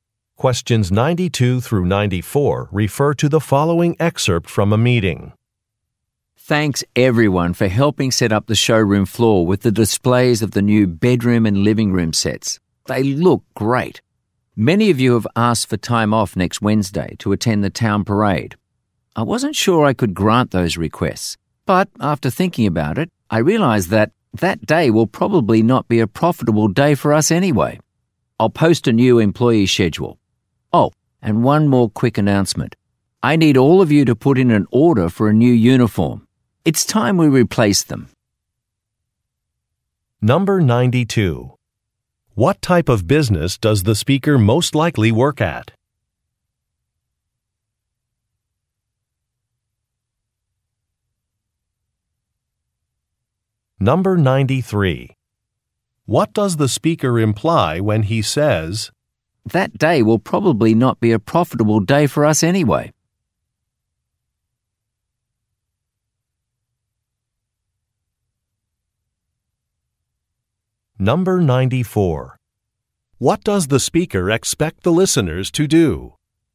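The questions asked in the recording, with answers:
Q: What type of business does the speaker most likely work at?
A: A furniture store

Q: What does the speaker expect the listeners to do?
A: Order a new uniform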